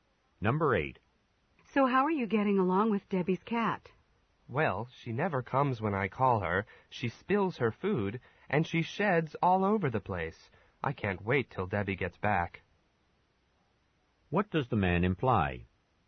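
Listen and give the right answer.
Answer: He doesn't like taking care of the cat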